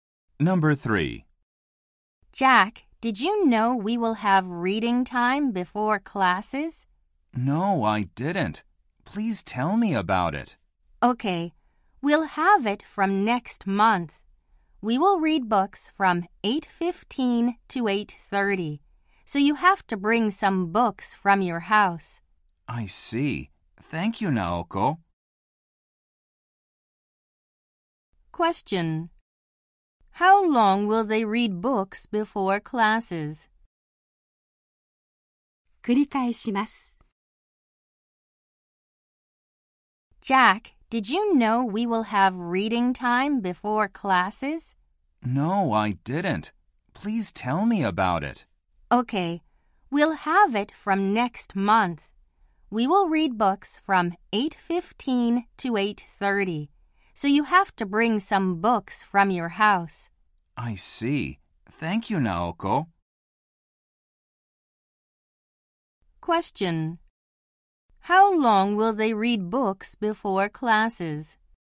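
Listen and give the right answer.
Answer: For fifteen minutes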